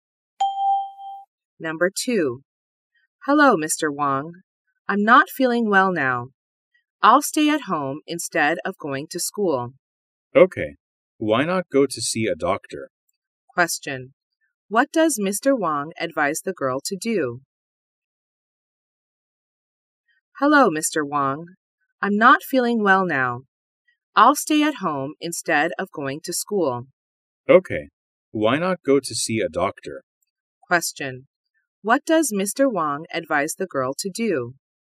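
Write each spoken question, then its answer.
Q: What does Mr. Wong advise the girl to do?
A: To go to see a doctor.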